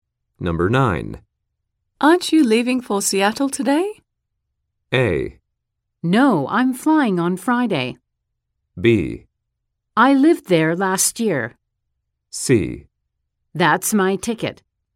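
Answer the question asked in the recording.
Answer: A: No, I'm flying on Friday.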